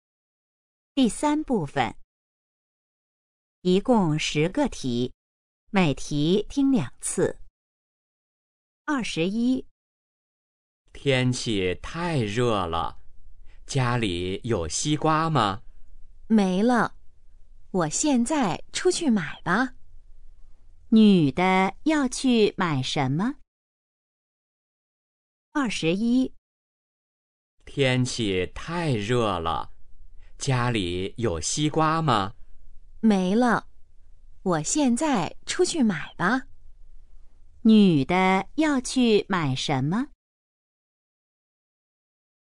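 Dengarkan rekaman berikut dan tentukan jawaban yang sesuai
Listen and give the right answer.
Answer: 西瓜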